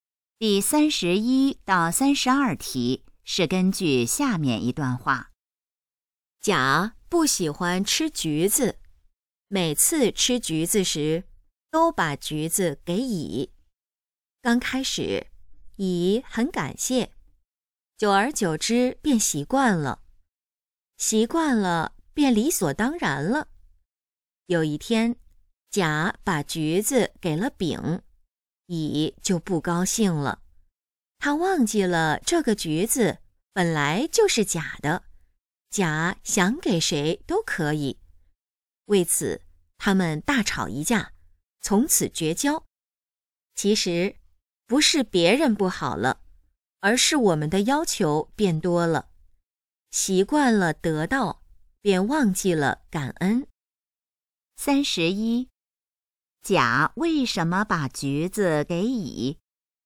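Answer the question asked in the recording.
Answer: 甲不喜欢吃橘子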